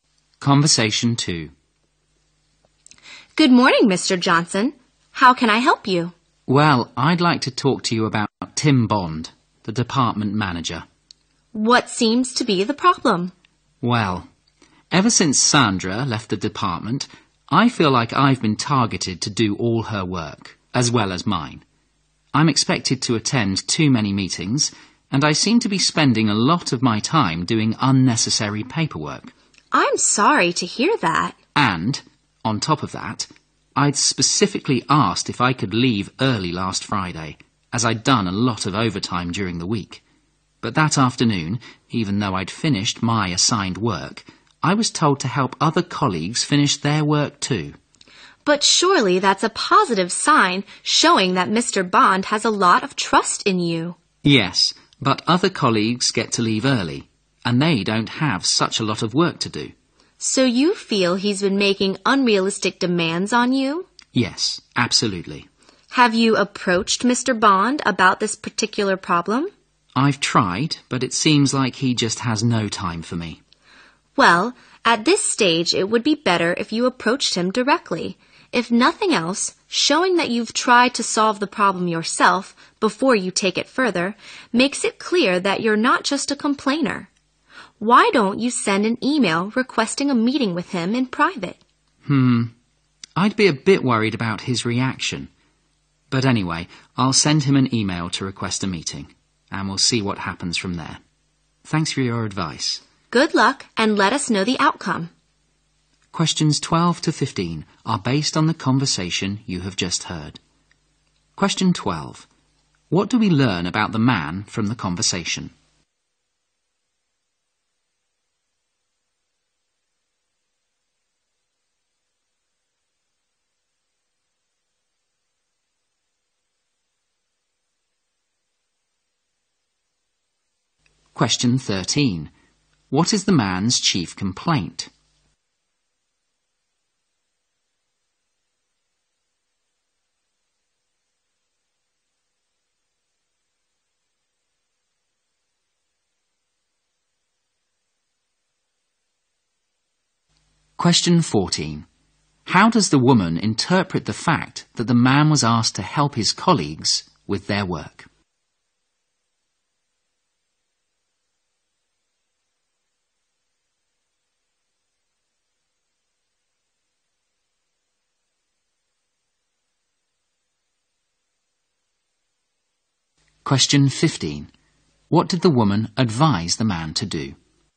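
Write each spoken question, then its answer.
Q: What is the man's chief complaint?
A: The manager makes unrealistic demands on him.

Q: How does the woman interpret the fact that the man was asked to help his colleagues with their work?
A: As a sign that Mr. Bond trusts him a lot.

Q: What did the woman advise the man to do?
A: Send Mr. Bond an email requesting a private meeting.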